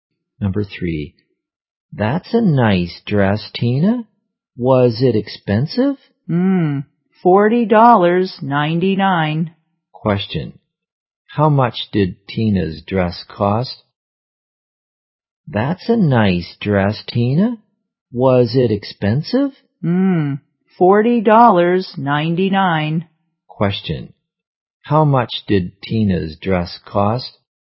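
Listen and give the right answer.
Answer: $40.99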